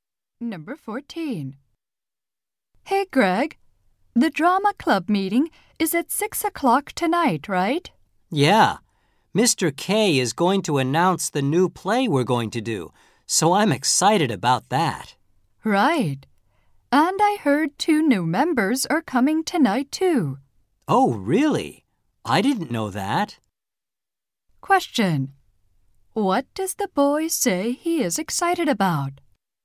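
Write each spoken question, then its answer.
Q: Question. What does the boy say he is excited about?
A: Hearing about the new play.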